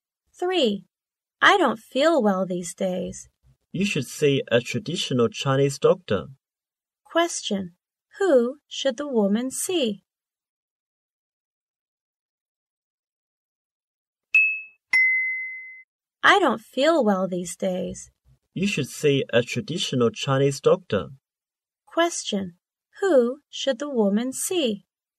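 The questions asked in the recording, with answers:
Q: Who should the woman see?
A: A traditional Chinese doctor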